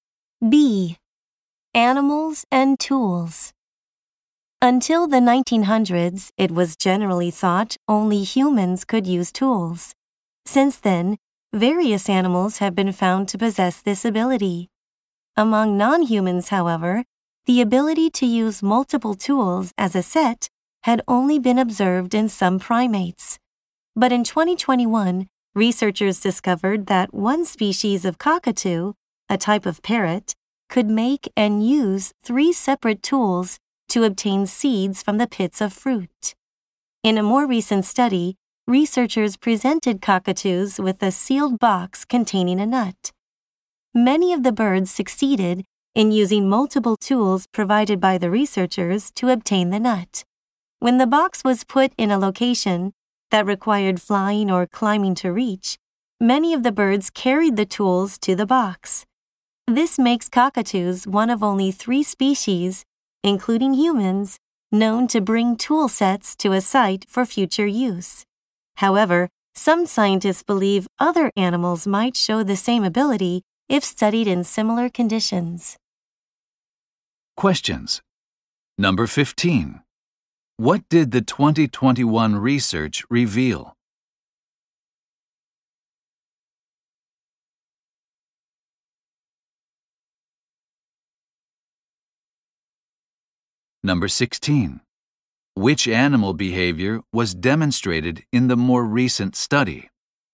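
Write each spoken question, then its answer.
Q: What did the 2021 research reveal?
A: A species of cockatoo could make and use three separate tools to get seeds from fruit pits

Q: Which animal behavior was demonstrated in the more recent study?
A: Cockatoos carried tool sets to a site for future use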